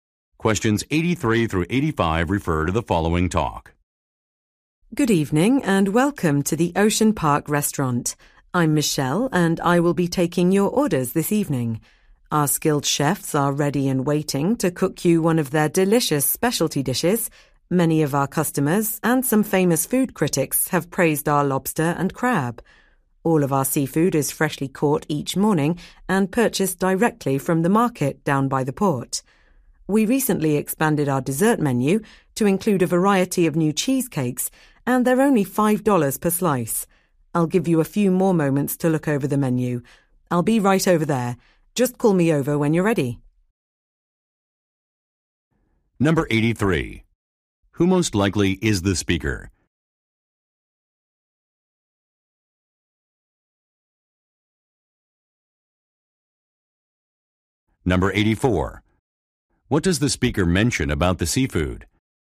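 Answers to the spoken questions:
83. A server at a restaurant
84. It is caught fresh each morning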